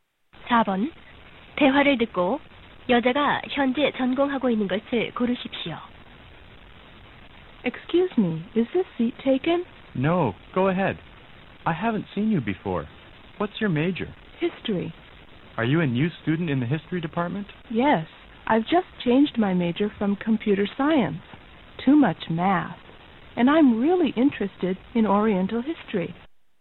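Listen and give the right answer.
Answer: 역사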